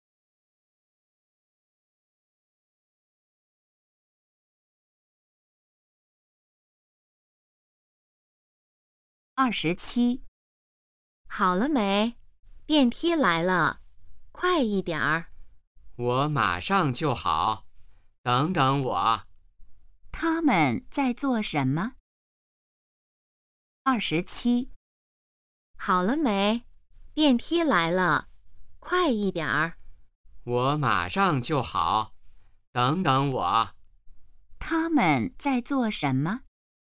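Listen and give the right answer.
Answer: 等电梯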